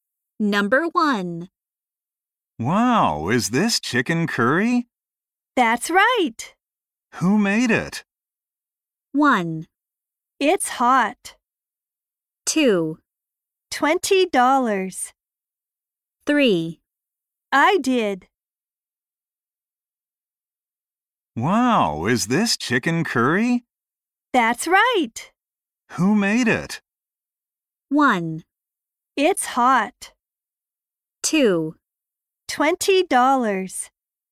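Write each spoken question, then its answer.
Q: Who made it?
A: 3: I did.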